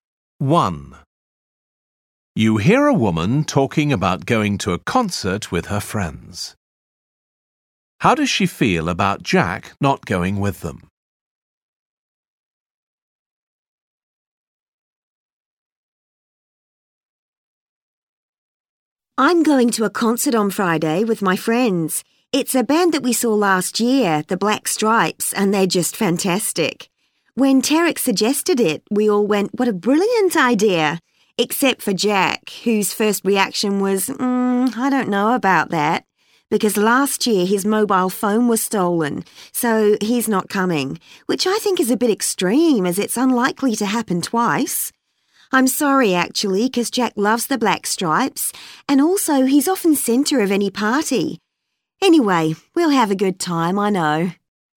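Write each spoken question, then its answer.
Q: How does she feel about Jack not going with them?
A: She's sorry he isn't going, and thinks his reason is a bit extreme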